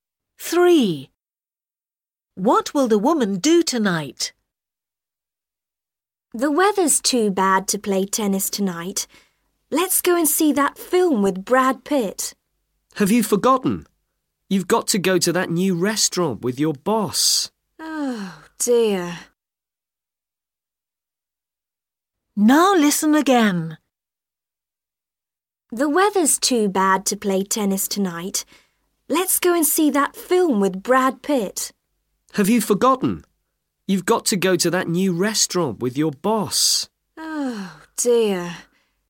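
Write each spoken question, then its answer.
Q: What will the woman do tonight?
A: Go to a new restaurant with her boss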